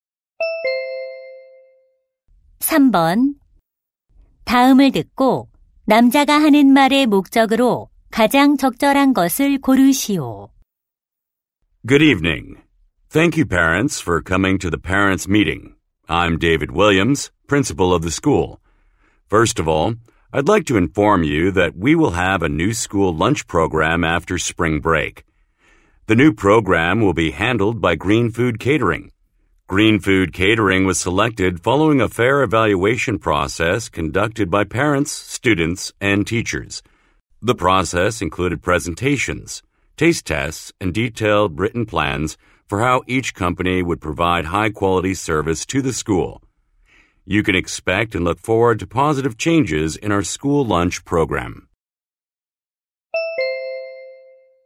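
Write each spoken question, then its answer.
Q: 다음을 듣고 남자가 하는 말의 목적으로 가장 적절한 것을 고르시오.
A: 새 학교 급식 프로그램(업체)을 안내하려고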